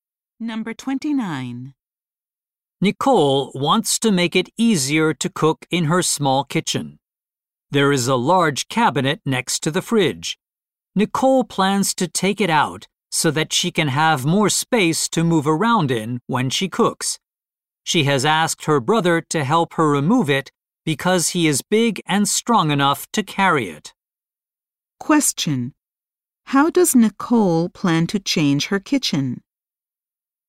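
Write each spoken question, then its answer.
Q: How does Nicole plan to change her kitchen?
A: By removing the large cabinet next to the fridge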